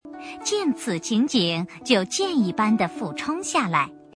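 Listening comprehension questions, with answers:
★音声を聞き、空欄〇に当てはまる単語を探して、授業内課題用紙に漢字とピンインを書いてください。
见此情景就箭〇〇地俯冲下来,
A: 一般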